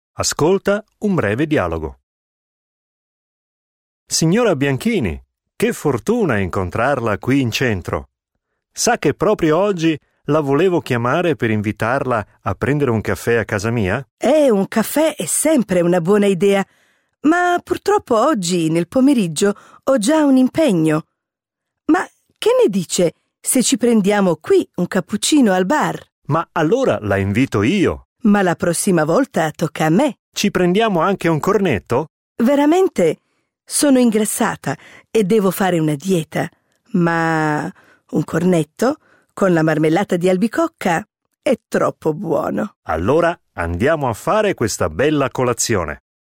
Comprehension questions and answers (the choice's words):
Ascolta un breve dialogo. L'affermazione seguente è vera o falsa?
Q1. Il signor Rolli voleva invitare la signora Bianchini per il pomeriggio.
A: vero

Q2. Il signor Rolli...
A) offre la colazione alla signora Bianchini.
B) invita la signora Bianchini a pranzo.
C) invita la signora Bianchini per un cappuccino a casa.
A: offre la colazione alla signora Bianchini.